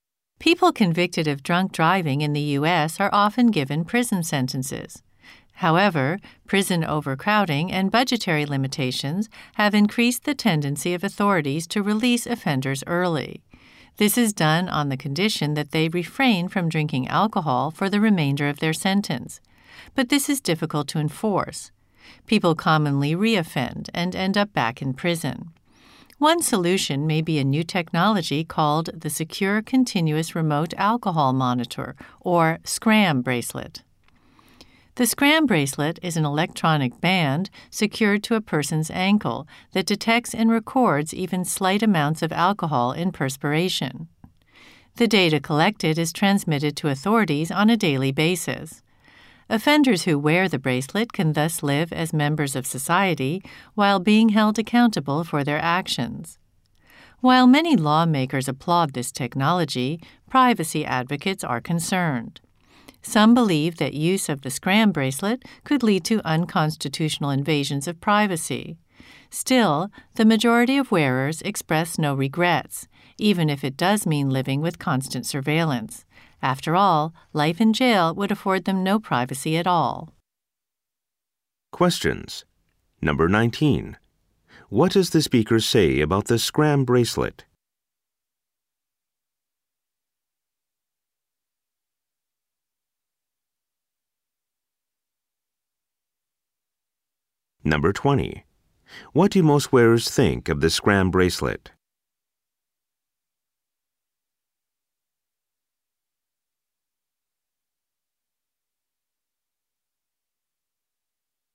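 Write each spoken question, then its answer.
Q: What do most wearers think of the SCRAM bracelet?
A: They don't regret wearing it, because it is better than being in jail.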